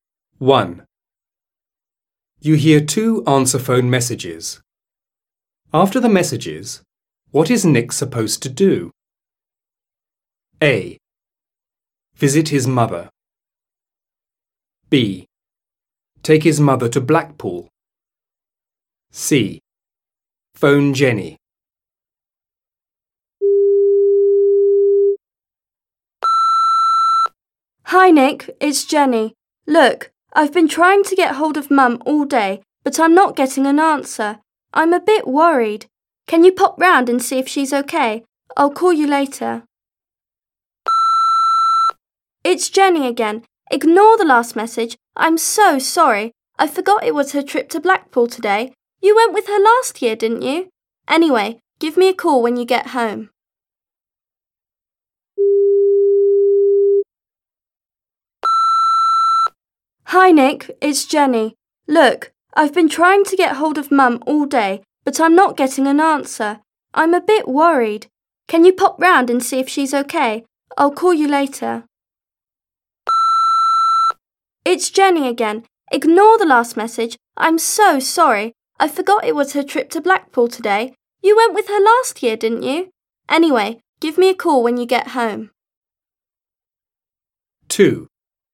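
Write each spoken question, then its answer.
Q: After the messages, what is Nick supposed to do?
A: C: Phone Jenny.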